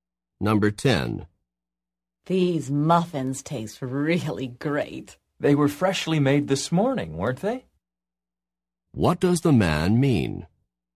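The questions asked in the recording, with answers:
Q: What does the man mean?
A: He thinks the muffins were made fresh this morning.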